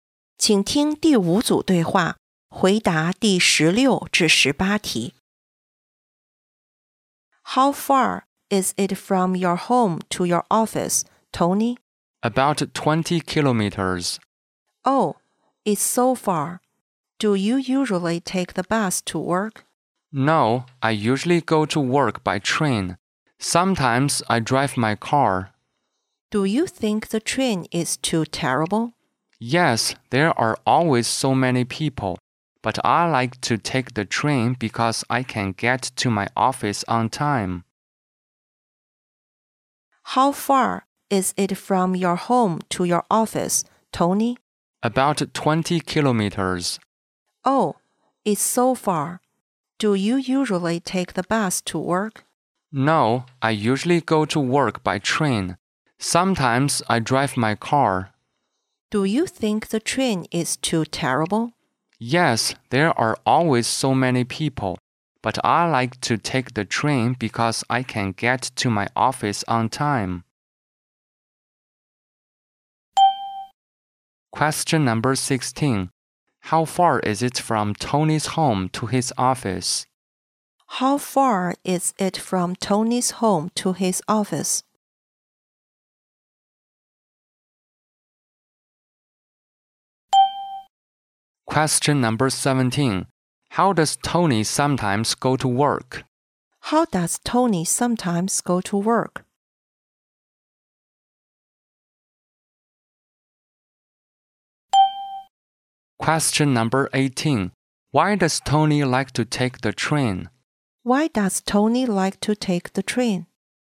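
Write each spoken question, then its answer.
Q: How far is it from Tony's home to his office?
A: About 20 kilometers

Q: How does Tony sometimes go to work?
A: He drives his car

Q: Why does Tony like to take the train?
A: Because he can get to his office on time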